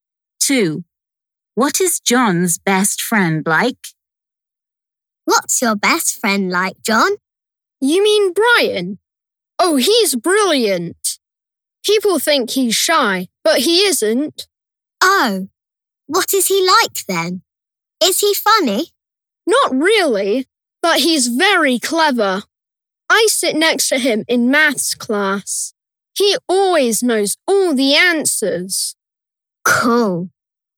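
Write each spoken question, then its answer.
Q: What is John's best friend like?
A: very clever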